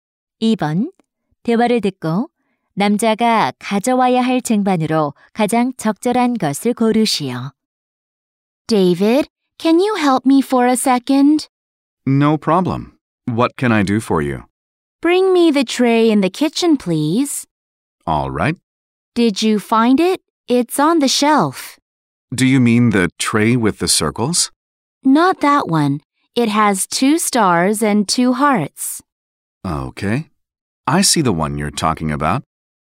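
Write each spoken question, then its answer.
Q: 대화를 듣고 남자가 가져와야 할 쟁반으로 가장 적절한 것을 고르시오.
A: 별 두 개와 하트 두 개가 있는 쟁반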